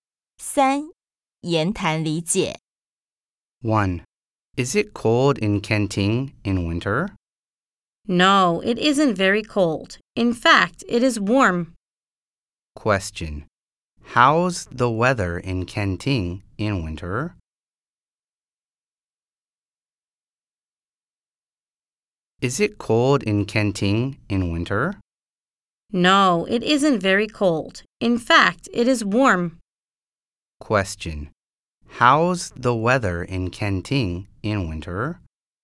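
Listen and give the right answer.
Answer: It is warm.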